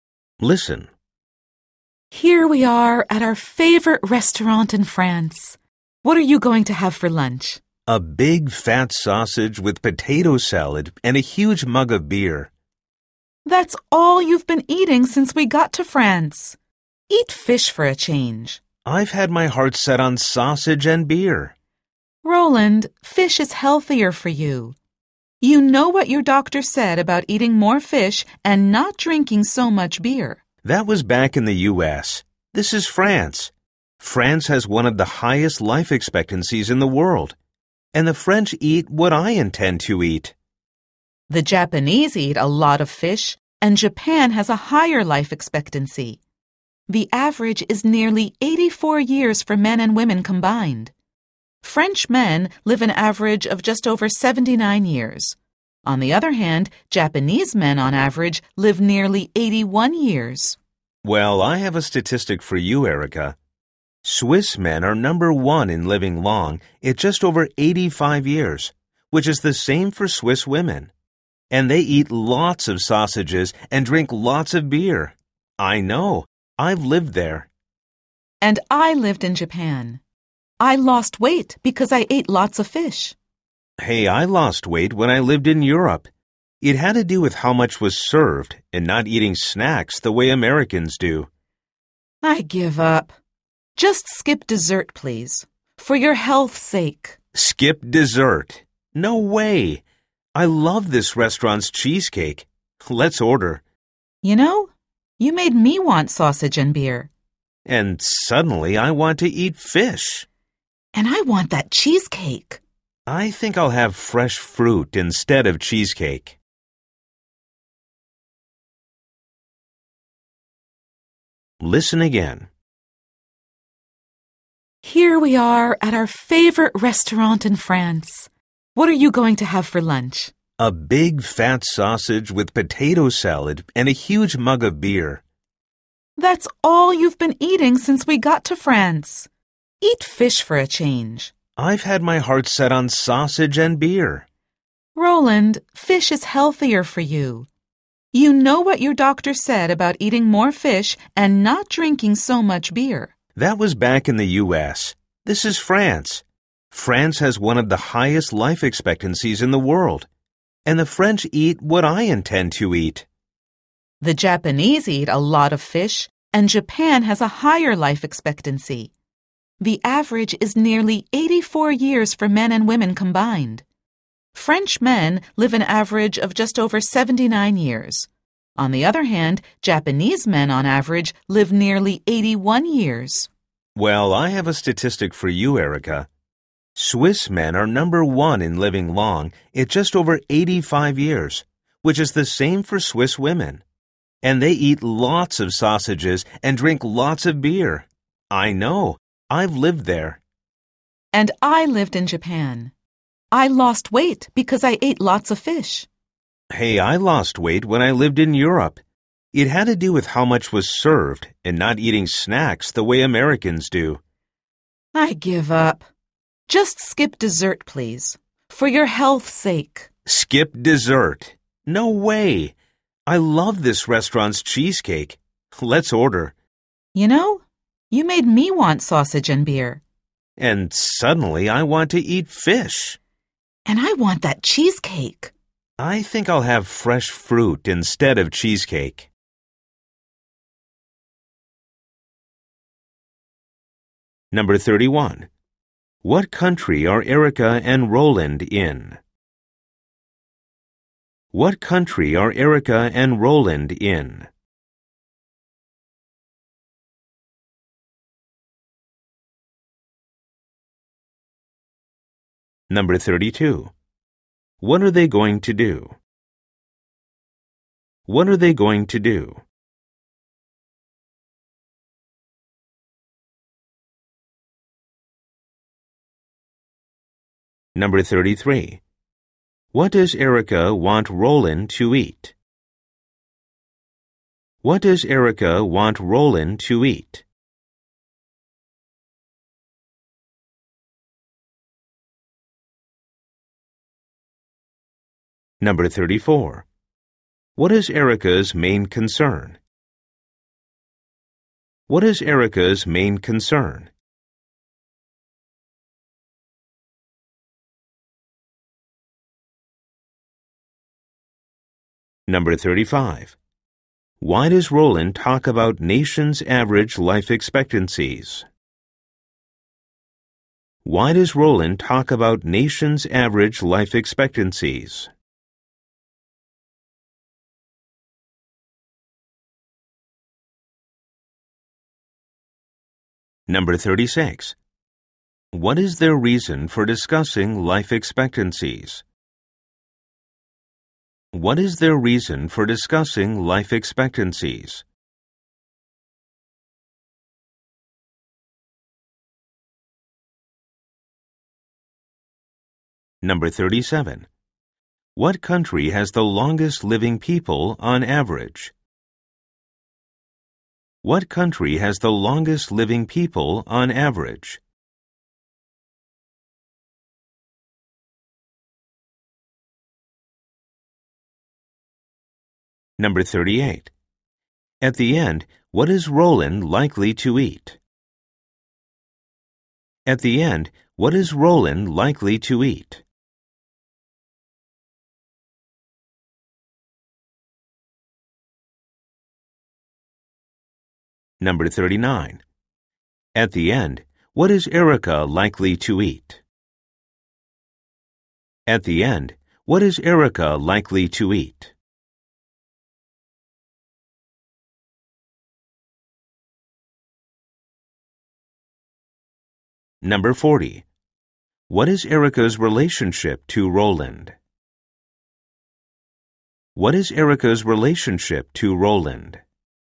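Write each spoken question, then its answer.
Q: What country are Erica and Roland in?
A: France

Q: What are they going to do?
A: Have lunch at their favorite restaurant

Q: What does Erica want Roland to eat?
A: Fish

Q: What is Erica's main concern?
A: Roland's health

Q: What country has the longest living people on average?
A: Switzerland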